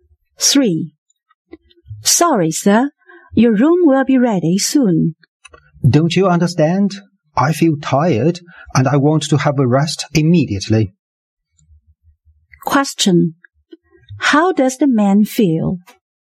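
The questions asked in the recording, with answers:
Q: How does the man feel?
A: Tired and impatient.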